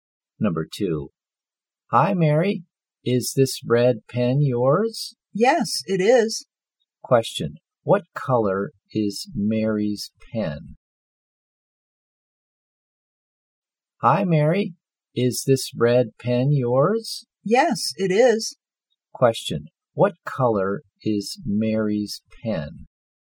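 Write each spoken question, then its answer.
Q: Question, what color is Mary's pen?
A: Red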